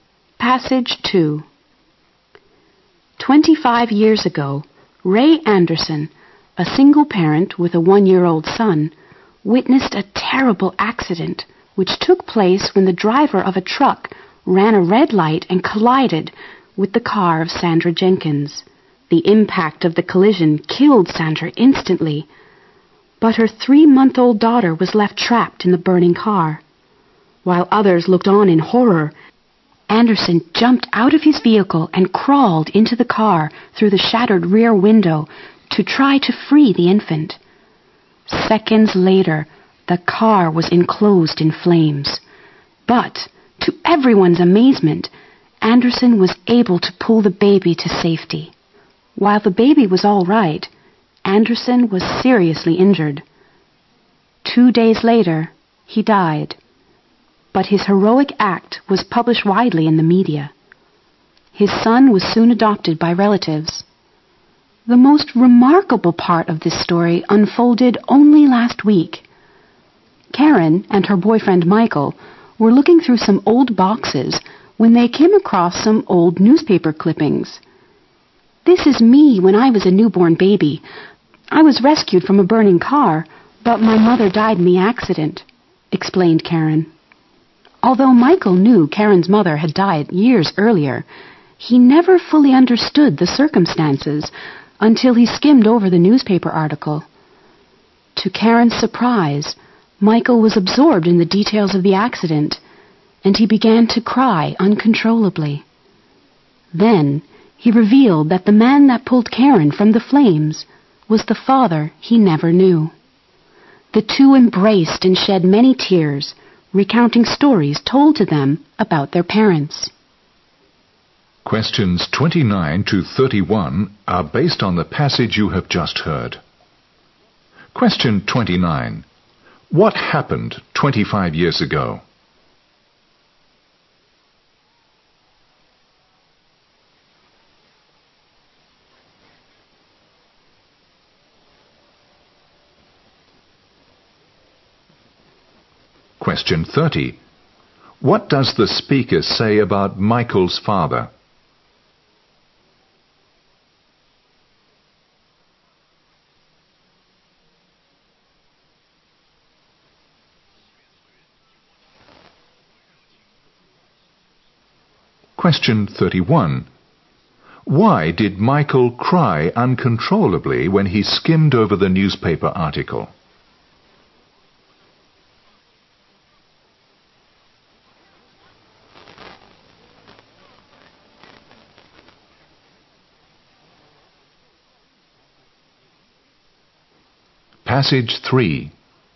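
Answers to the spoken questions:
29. Ray Anderson rescued a baby from a burning car after a crash
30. He died a hero after saving Karen from the burning car
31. He learned the man who rescued Karen was his own father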